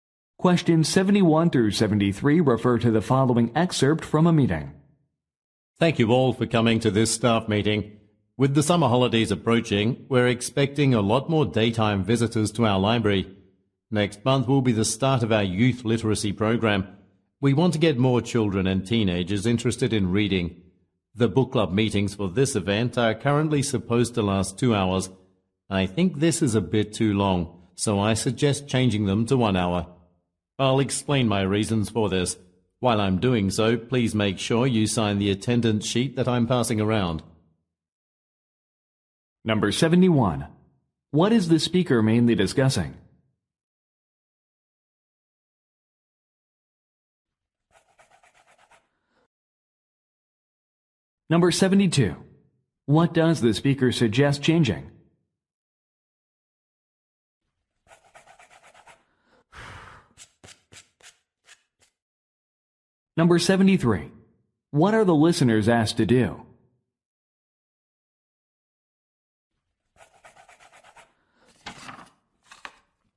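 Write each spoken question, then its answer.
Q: What is the speaker mainly discussing?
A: A youth literacy program at the library

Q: What does the speaker suggest changing?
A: The length of book club meetings, from 2 hours to 1 hour

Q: What are the listeners asked to do?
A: Sign the attendance sheet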